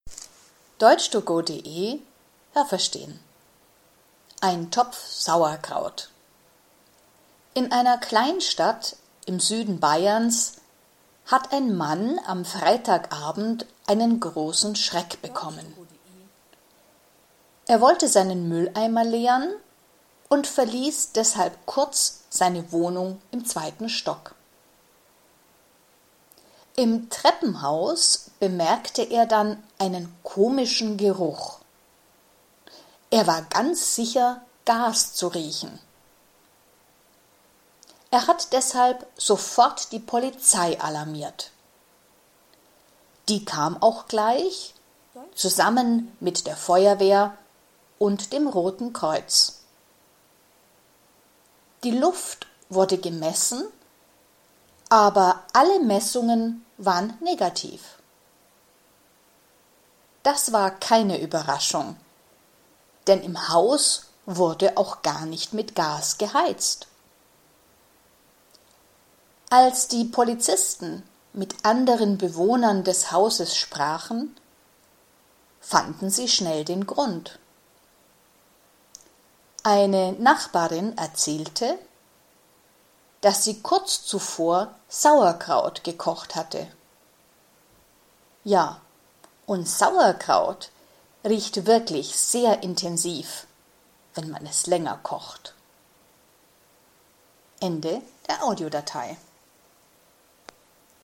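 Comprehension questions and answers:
Haben Sie das gehört? Stimmt diese Aussage?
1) Die Geschichte ist in einer großen Stadt in Bayern passiert.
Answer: Nein, das habe ich nicht gehört.

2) Ein Mann glaubte, in seiner Wohnung Gas zu riechen.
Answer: Nein, das habe ich nicht gehört.

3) Er hat das Rote Kreuz angerufen.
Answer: Nein, das habe ich nicht gehört.

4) Man hat die Luft gemessen, aber kein Gas gefunden.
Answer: Ja, das habe ich gehört.

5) In diesem Haus hat man nicht mit Gas geheizt.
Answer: Ja, das habe ich gehört.

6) Der Mann wohnte allein in diesem Haus.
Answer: Nein, das habe ich nicht gehört.

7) Es hat komisch gerochen, weil eine Nachbarin Sauerkraut gekocht hat.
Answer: Ja, das habe ich gehört.

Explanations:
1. Sie ist in einer Kleinstadt in Bayern passiert.
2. Er glaubte, im Treppenhaus Gas zu riechen.
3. Er hat die Polizei angerufen, aber auch die Feuerwehr und das Rote Kreuz sind gekommen.

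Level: A2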